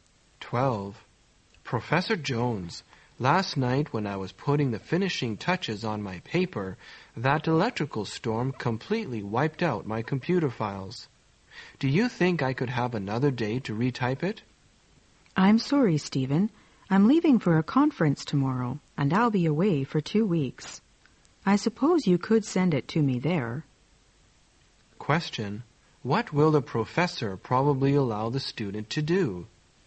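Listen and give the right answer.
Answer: Send the paper to him at the conference.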